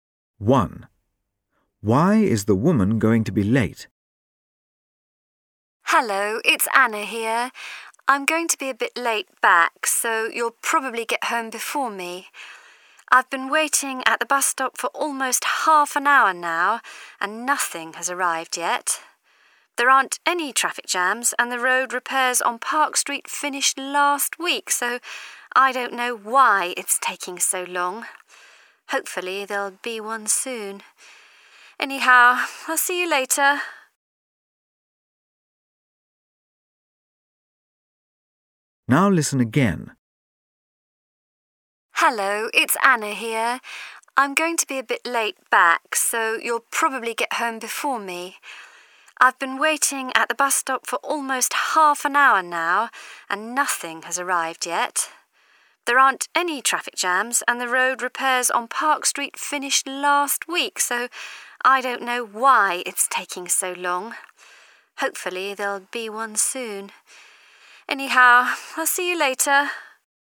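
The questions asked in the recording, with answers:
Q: Why is the woman going to be late?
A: The bus hasn't come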